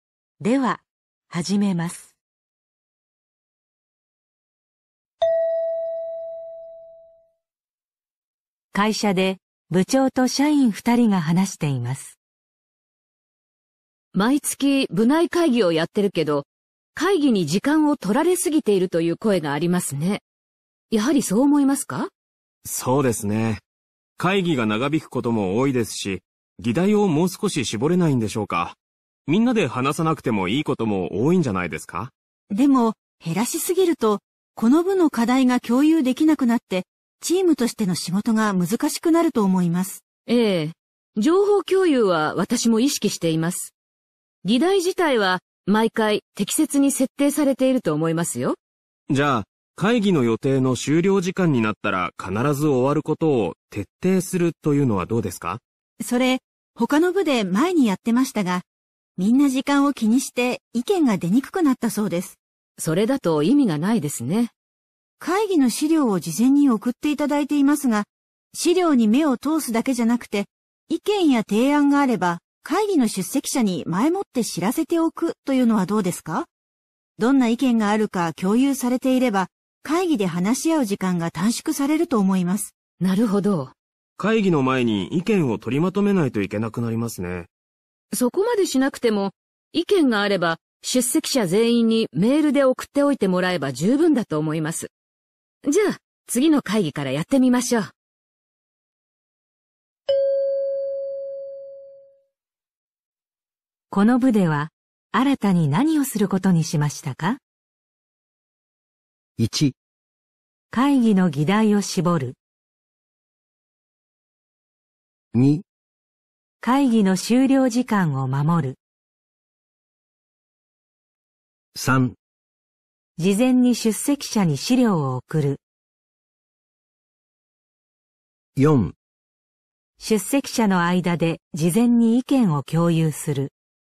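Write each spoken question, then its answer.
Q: この部では、新たに何をすることにしましたか?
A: 4: 出席者の間で事前に意見を共有する。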